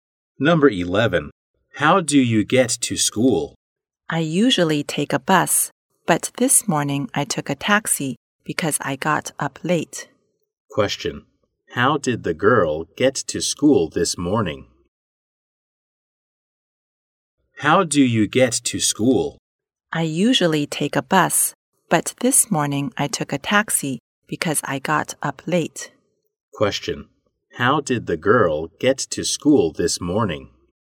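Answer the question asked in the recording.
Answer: By taxi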